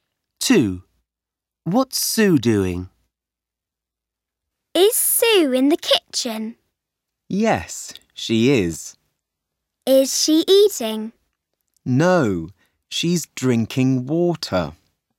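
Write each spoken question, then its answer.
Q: What's Sue doing?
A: Drinking water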